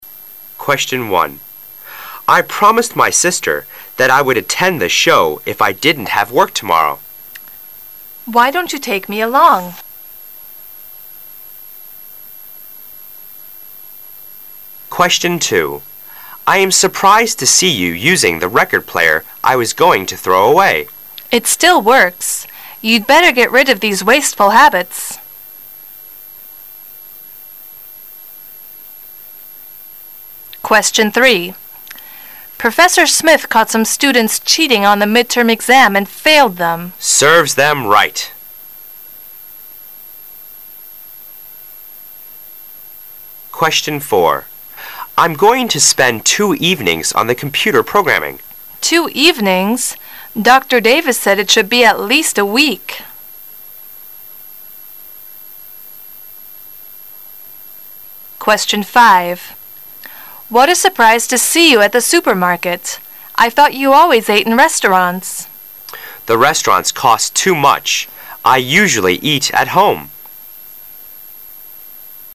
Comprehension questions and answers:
Part A You will hear 10 short dialogues. For each dialogue, there is one question and four possible answers. Choose the correct answer—A, B, C or D, and mark it in your test booklet. You will have 15 seconds to answer the question and you will hear each dialogue ONLY ONCE. Now look at Question 1.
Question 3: How does the man react to the woman's statement?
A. He feels sorry for those students.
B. He thinks it right to punish those students.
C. He thinks those students should be expelled from college.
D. He thinks the punishment is too severe.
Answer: He thinks it right to punish those students.

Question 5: Where does the conversation most probably take place?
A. In the supermarket.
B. In the restaurant.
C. In the man's home.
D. In the woman's home.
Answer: In the supermarket.

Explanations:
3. W: Professor Smith caught some students cheating on the mid-term exam and failed them. M: Serves them right.

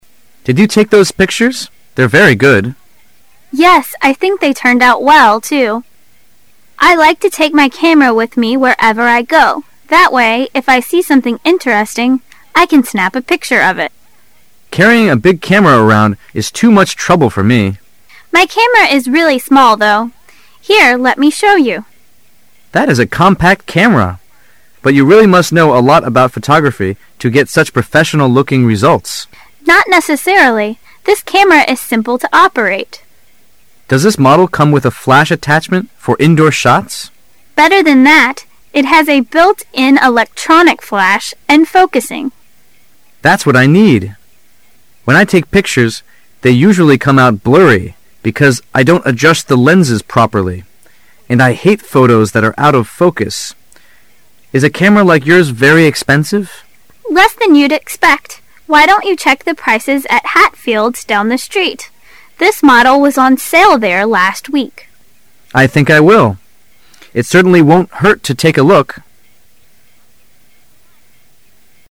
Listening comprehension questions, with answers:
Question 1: As the conversation begins, what are the man and woman doing?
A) Looking at some photographs.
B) Selling cameras.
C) Teaching a photography class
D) Repairing camera equipment.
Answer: Looking at some photographs.

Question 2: Why doesn't' the man carry a camera with him?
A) He has a professional photographer take pictures for him.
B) He doesn't think he knows.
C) He doesn't have a flash attachment.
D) He thinks a big camera would be too much trouble.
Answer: He thinks a big camera would be too much trouble.

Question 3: According to the woman, what is one major advantage of the camera?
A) It focuses automatically.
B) It has a lot of specialized lenses.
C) It is easy to load.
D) It advances the film automatically.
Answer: It focuses automatically.

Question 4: What fails him?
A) He can't find good subjects to photograph.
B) His indoor shots are too dark.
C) His pictures are often blurry.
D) His camera is too old for good detail.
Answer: His pictures are often blurry.

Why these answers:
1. 谈话的中心是camera的,那么它的性能、质量、价格都是我们所关心的,将重点放在此。 [详细解答] 从选项猜测,肯定会问这两个人在干什么。 The man said:"Did you take these picture? They're very good."由此判断他们在看照片,因此选A。
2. 本题肯定是关于the man的情况的。 [详细解答] The man said:"She always liked to take the camera wherever she went and snapped everything interesting.But the man didn't.因为太麻烦,因而选D。
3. 本题是关于camera的性能的,具体指什么? [详细解答] 问题是the woman's camera's one major advantage.自然A是正确答案。
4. 关于the man's camera. [详细解答] The woman's camera has a built-in electronic flash and focusing.But the man's hasn't.and without indoor shots.那么他照相时会遇到什么问题呢? 因此答案C。

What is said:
They're very good. W: Yes, I think they turned out well, too. I like to take my camera with me wherever I go. That way, if I see something interesting, I can snap a picture of it. M: Carrying a big camera around is too much trouble for me. W: My camera is really small, though. Here, let me show you. M: That is a compact camera. But you really must know a lot about photography to get such professional looking results. W: Not necessarily. This camera is simple to operate. M: Does this model come with a flash attachment for indoor shots? W: Better than that. It has a built-in electronic flash, and focusing. M: That's what I need. When I take pictures they usually come out blurry because I don't adjust the lenses popery, and I hate photos that are out of focus. Is a camera like yours very expensive? W: Less than you'd expect. Why don't you cheek the prices at Hatfield's down the street? This model was on sale there last week. M: I think I will. It certainly won't hurt to take a look.

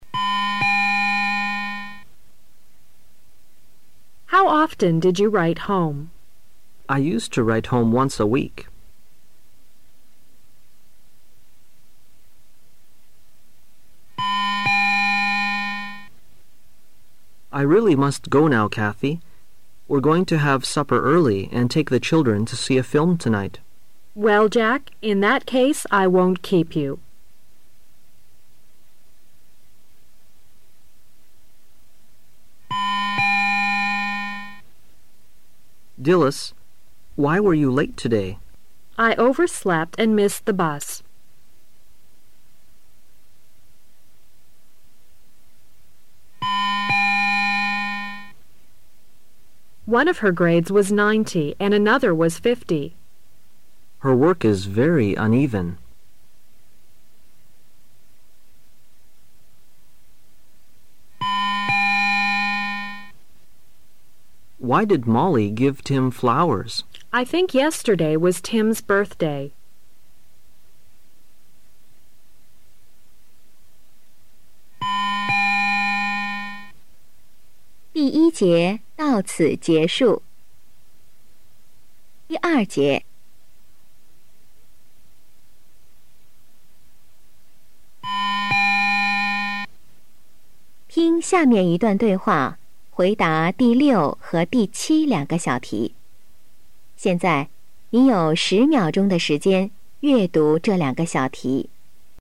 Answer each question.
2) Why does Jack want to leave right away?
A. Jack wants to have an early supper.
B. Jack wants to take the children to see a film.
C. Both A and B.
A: Both A and B.

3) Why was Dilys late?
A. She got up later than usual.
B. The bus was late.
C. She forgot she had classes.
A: She got up later than usual.

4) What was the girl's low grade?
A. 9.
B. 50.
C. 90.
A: 50.

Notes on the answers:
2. M:I really must go now, Cathy.We're going to have supper earlier and take the Children to see a film tonight. W:Well,Jack.In that case,I won't keep you.
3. M: Dilys, why were you late today? W:I overslept and missed the bus.
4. W: One of her grades was 90, and another was 50. M: Her work is very uneven.

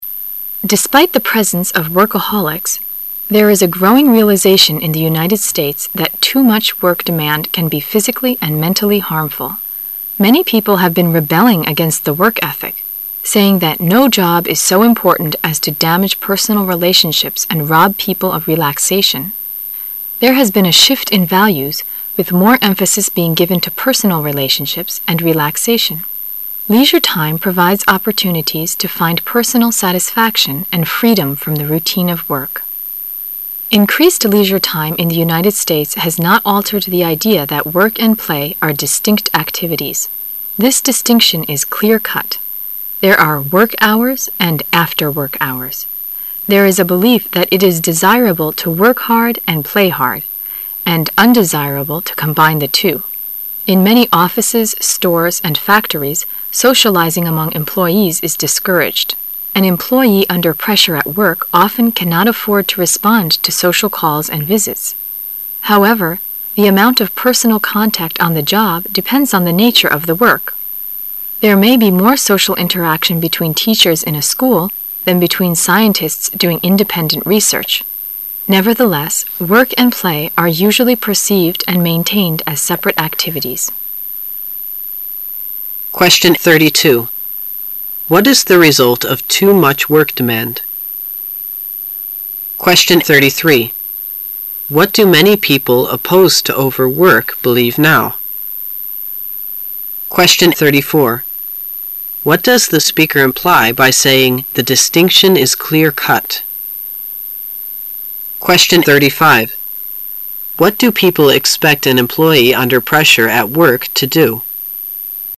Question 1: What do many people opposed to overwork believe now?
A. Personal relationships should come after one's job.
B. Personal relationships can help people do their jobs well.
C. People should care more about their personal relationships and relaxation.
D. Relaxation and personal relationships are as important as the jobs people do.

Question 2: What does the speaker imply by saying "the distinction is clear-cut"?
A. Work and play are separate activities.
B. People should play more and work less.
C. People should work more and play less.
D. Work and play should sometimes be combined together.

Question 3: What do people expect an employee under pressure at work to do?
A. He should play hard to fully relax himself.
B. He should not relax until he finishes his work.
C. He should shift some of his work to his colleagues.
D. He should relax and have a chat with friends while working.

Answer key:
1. People should care more about their personal relationships and relaxation.
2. Work and play are separate activities.
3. He should not relax until he finishes his work.

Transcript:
A
[解析] 32-35 Despite the presence of workaholics, there is a growing realization in the United States that too much work demand can be physically and mentally harmful. Many people have been rebelling against the work ethic, saying that no job is so important as to damage personal relationships and rob people of relaxation. There has been a shift in values, with more emphasis being given to personal relationships and relaxation. Leisure time provides opportunities to find personal satisfaction and freedom from the routine of work. Increased leisure time in the United States has not altered the idea that work and play are distinct activities. This distinction is clear-cut; there are "work-hours" and "after-work-hours". There is a belief that it is desirable "to work hard and play hard" and undesirable to combine the two. In many offices, stores, and factories socializing among employees is discouraged. An employee under pressure at work often cannot afford to respond to social calls and visits. However, the amount of personal contact on the job depends on the nature of the work. There may be more social interaction between teachers in a school than between scientists doing independent research. Nevertheless, work and play are usually perceived and maintained as separate activities. What is the result of too much work demand?

